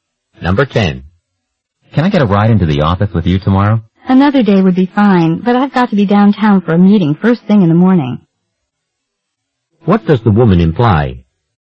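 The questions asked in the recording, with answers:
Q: What does the woman imply?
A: She can't give him a ride tomorrow.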